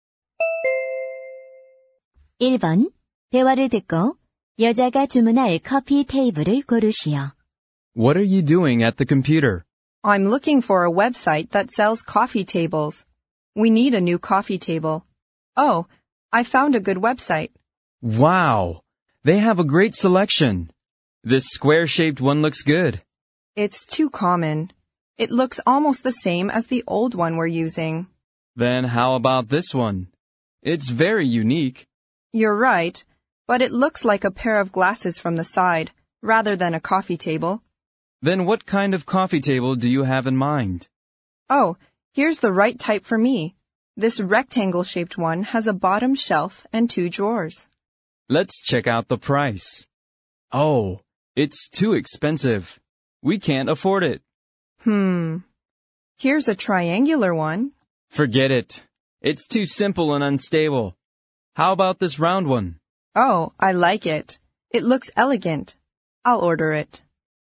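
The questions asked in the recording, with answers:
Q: 대화를 듣고 여자가 주문할 커피 테이블을 고르시오.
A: 둥근 커피 테이블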